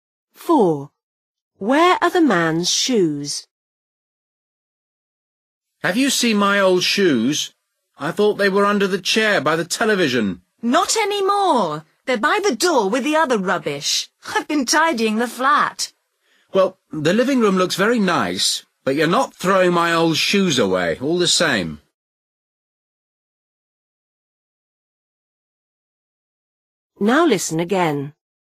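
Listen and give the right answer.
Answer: By the door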